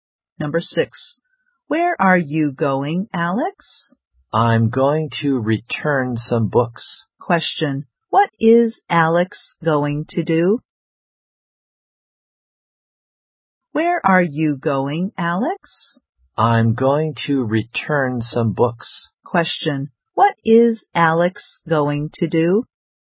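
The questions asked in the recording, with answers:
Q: What is Alex going to do?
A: Return some books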